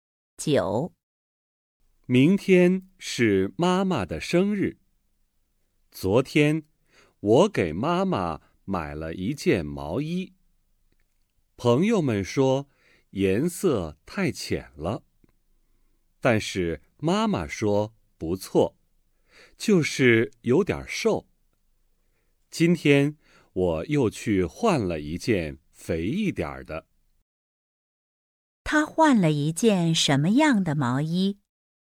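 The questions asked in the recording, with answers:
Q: 他换了一件什么样的毛衣?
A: 肥一点的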